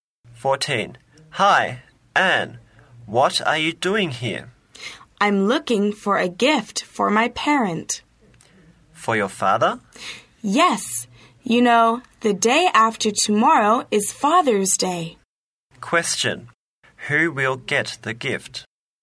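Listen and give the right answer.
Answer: Anne's father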